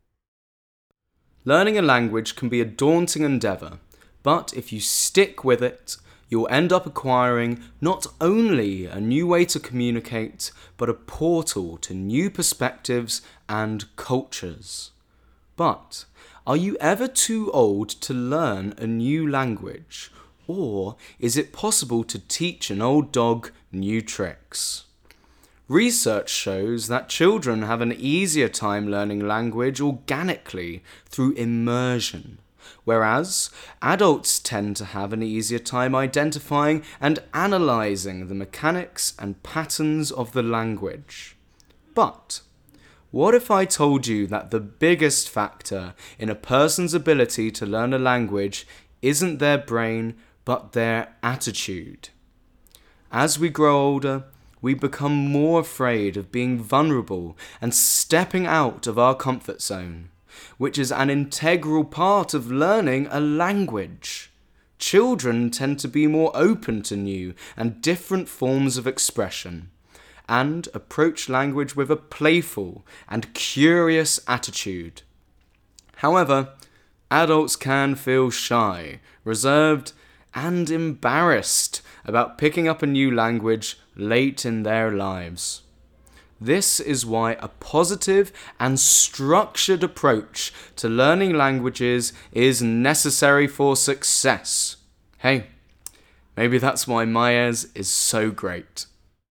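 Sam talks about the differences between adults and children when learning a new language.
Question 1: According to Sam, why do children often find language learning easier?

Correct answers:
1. They are more open and approach language with a playful, curious attitude.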